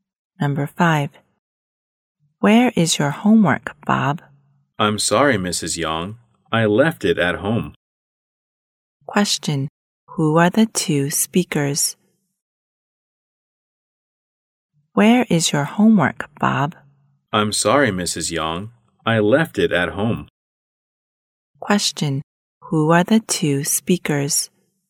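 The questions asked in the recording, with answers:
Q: Question. Who are the two speakers?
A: A teacher and a student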